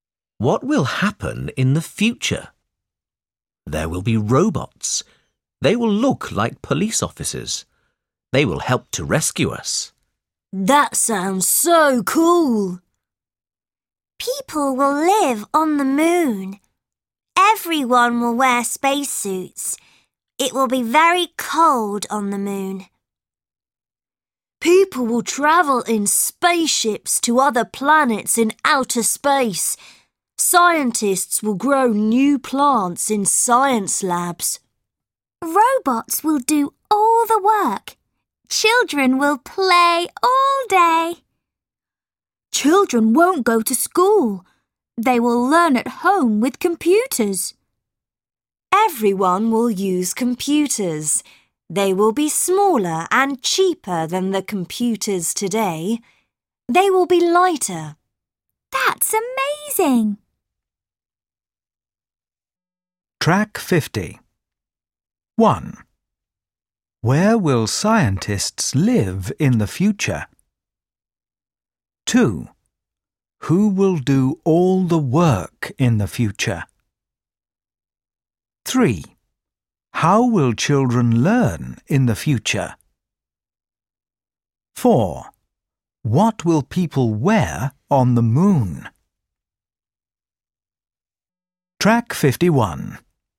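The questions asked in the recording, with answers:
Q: Who will do all the work in the future?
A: Robots

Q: How will children learn in the future?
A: At home with computers

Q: What will people wear on the moon?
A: Spacesuits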